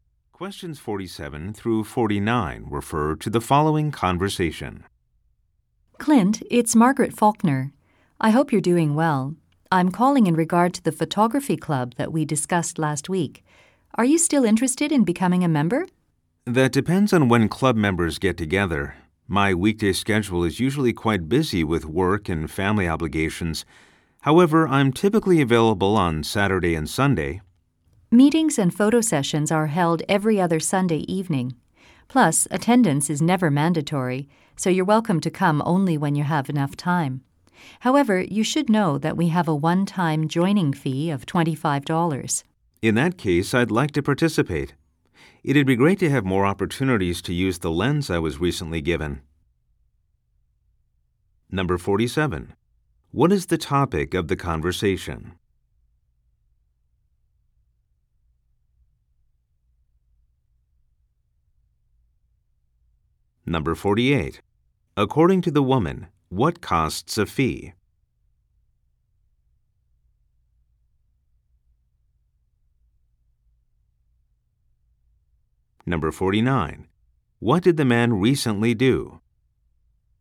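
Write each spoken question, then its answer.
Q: What is the topic of the conversation?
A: Joining a photography club

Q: According to the woman, what costs a fee?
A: Joining the club

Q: What did the man recently do?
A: He was given a lens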